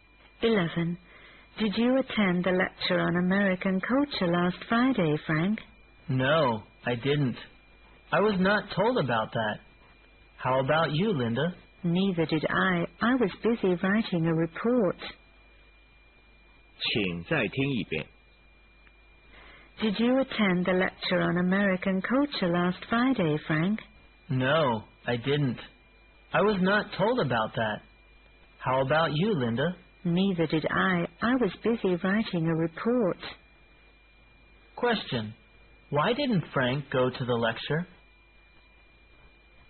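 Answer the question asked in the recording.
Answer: He was not told about it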